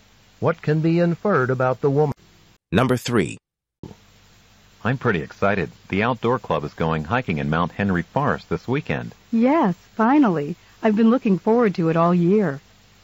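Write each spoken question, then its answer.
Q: What can be inferred about the speakers?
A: They are both looking forward to the hiking trip.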